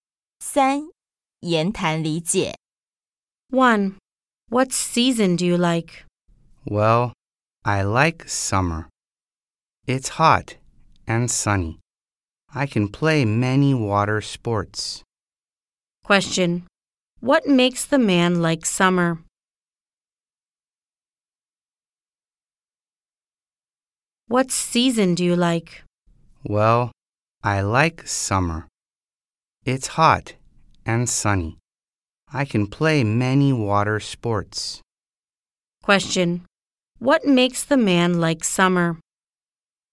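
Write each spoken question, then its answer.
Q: What makes the man like summer?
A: It's hot and sunny and he can play many water sports.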